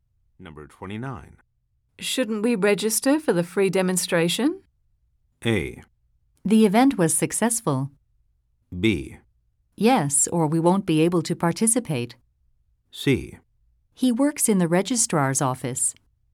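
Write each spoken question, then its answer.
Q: Shouldn't we register for the free demonstration?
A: B: Yes, or we won't be able to participate.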